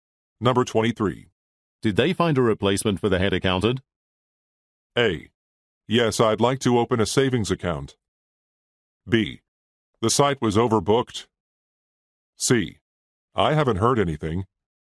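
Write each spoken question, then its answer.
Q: Did they find a replacement for the head accountant?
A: C: I haven't heard anything.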